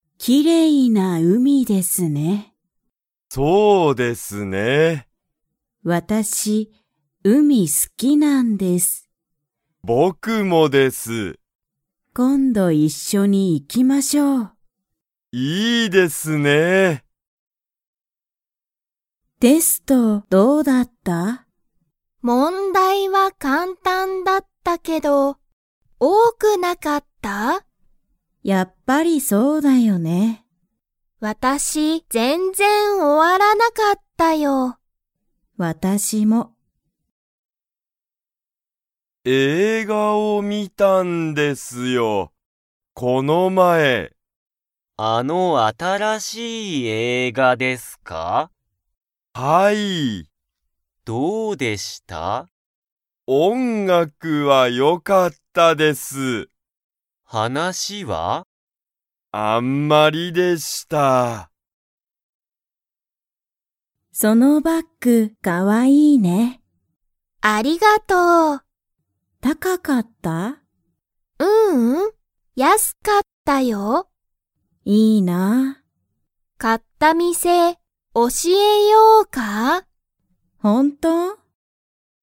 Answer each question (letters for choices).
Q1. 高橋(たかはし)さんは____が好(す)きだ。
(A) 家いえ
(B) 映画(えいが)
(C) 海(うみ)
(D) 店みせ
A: C

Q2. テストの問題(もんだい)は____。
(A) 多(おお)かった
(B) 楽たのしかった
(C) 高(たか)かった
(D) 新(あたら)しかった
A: A

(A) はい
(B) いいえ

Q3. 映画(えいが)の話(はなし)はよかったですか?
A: B

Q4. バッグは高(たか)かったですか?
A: B

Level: Level 1